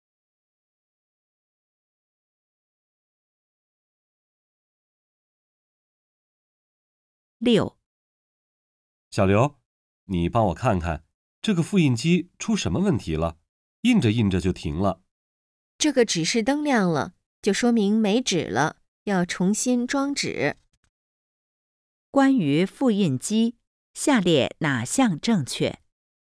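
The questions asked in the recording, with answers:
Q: 关于复印机,下列哪项正确?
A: 没纸了,需要重新装纸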